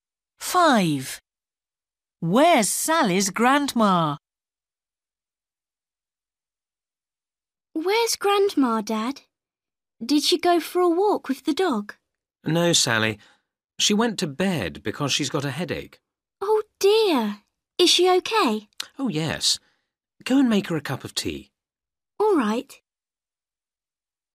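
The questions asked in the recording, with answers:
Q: Where's Sally's grandma?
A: In bed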